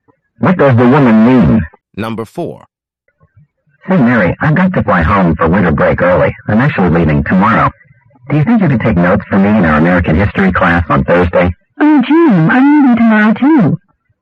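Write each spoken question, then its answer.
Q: What does the woman imply?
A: She can't take notes for him because she is leaving too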